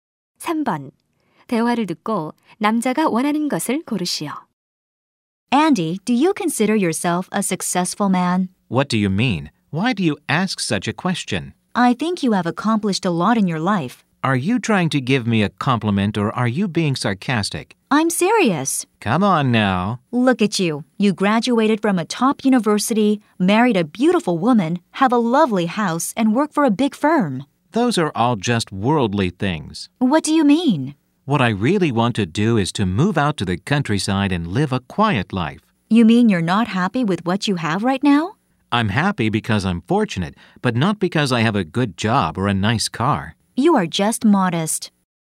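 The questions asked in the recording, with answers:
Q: 대화를 듣고 남자가 원하는 것을 고르시오.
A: 시골로 이사해 조용히 사는 것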